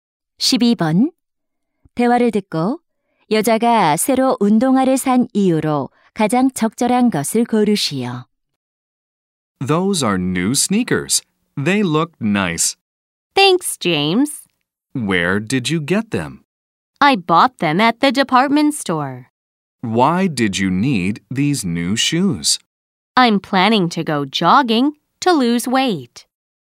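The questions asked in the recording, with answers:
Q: 대화를 듣고 여자가 새로 운동화를 산 이유로 가장 적절한 것을 고르시오.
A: 살을 빼기 위해 조깅하려고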